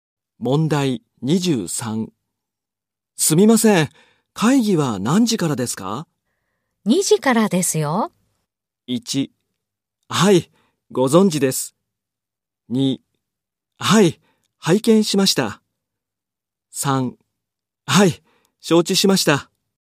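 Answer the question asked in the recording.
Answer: 3: はい、承知しました。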